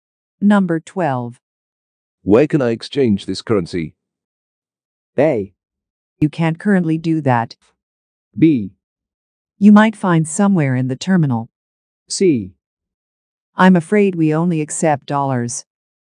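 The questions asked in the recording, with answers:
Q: Where can I exchange this currency?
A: B: You might find somewhere in the terminal.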